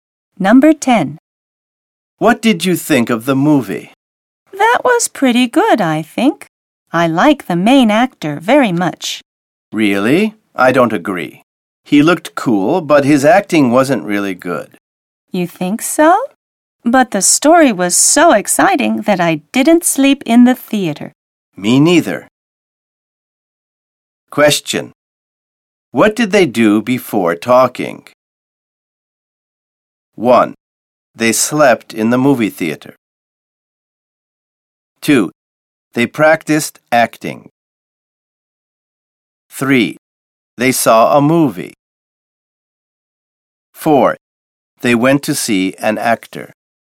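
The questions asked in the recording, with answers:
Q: What did they do before talking?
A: 3: They saw a movie.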